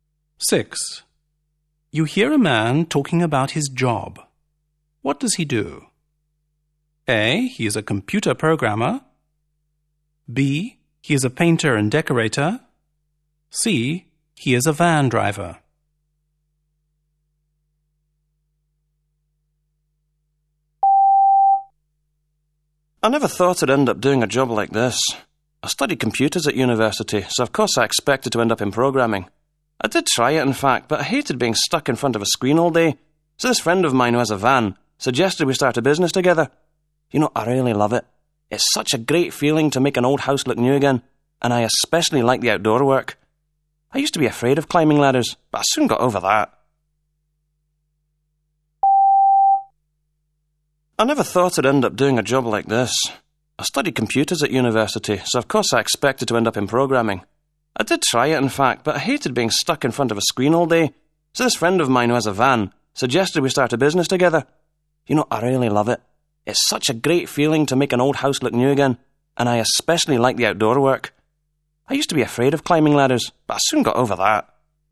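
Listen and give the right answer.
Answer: B: He is a painter and decorator.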